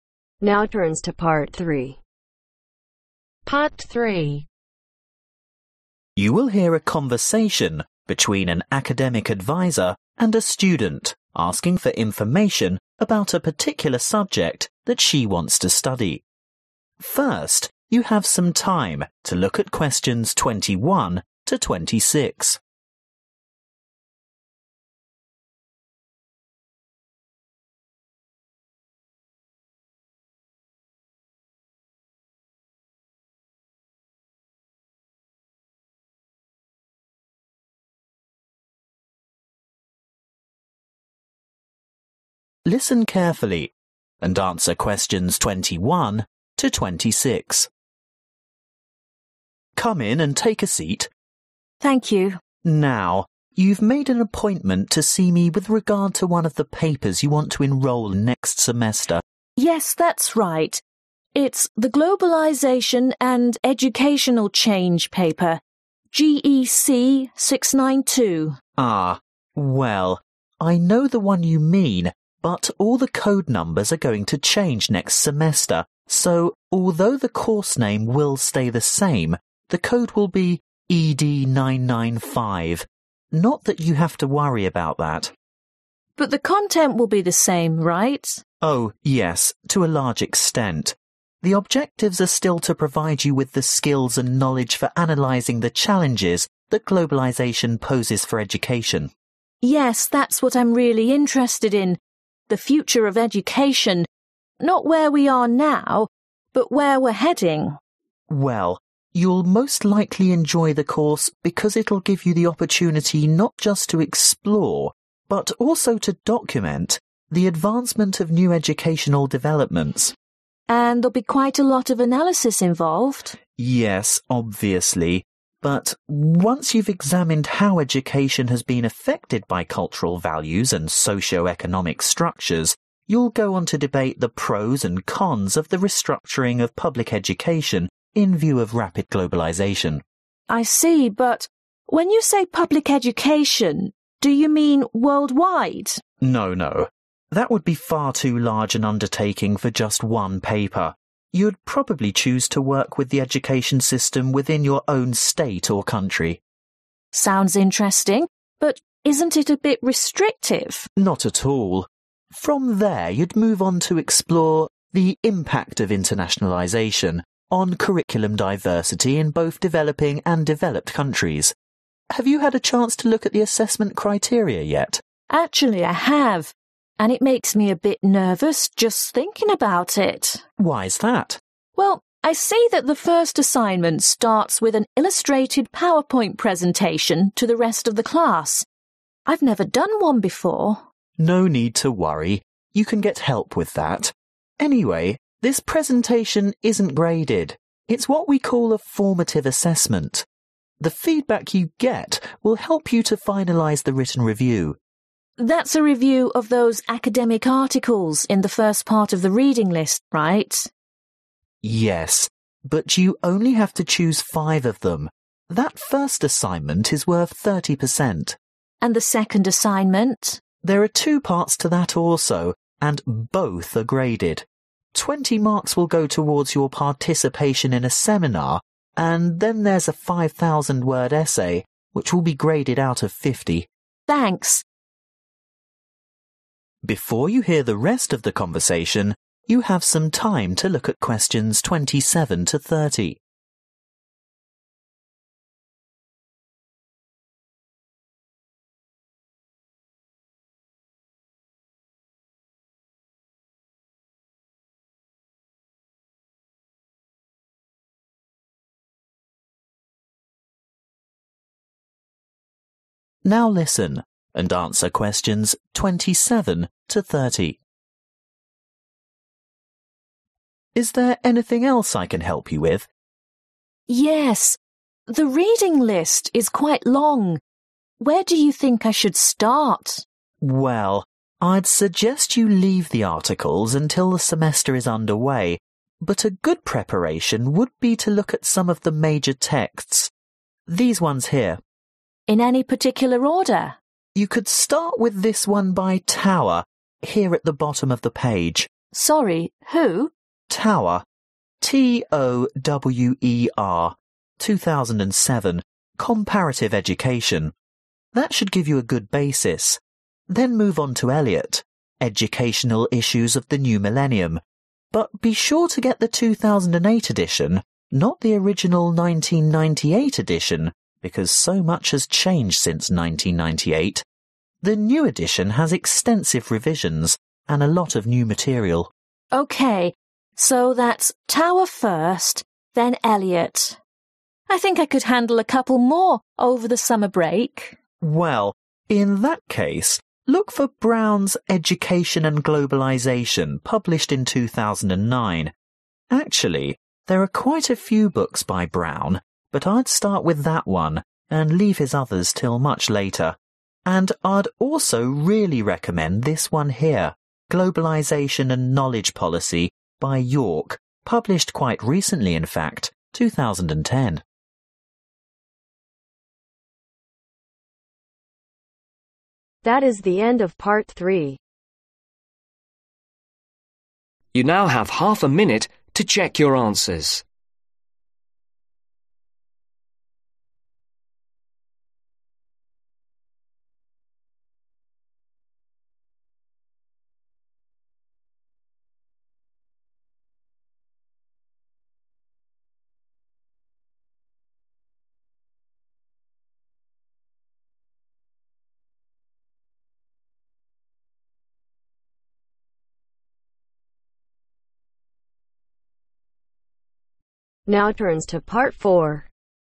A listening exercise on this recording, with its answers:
Complete the notes below. Write NO MORE THAN TWO WORDS for each answer.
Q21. New Code: (21)............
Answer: ED 995

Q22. Chance to research and (22)............ progress of educational change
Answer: Document

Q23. Investigate influence of culture and (23)............ on education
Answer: Socio-economic structures

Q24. Consider the (24)............ of globalization on diversity of national curricula across richer and poorer countries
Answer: Impact

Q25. Assignment # 1= power points presentation (ungraded) + (25)............ (30%)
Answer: Written review

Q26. Assignment # 2= take part in (26)............ (20%) + essay (50%)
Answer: Seminar

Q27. (27)............ | Comparative Education | 2007 |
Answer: Tower

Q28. Elliot | Educational Issues of the New Millennium | (28)............ |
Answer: 2008

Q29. (29)............ | Education and Globalization | 2009 |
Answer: Brown

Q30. York | Globalization and (30)............ | 2010 |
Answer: knowledge Policy